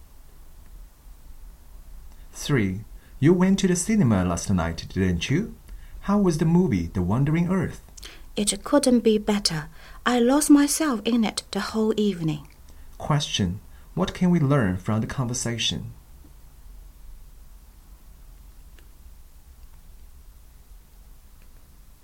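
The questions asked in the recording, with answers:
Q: What can we learn from the conversation?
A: The speaker enjoyed the movie very much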